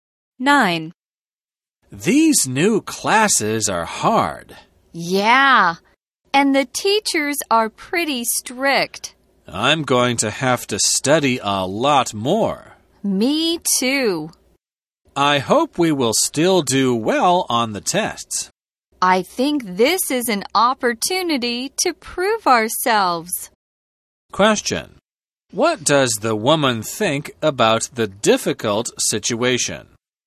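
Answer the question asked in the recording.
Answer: It is an opportunity to prove themselves.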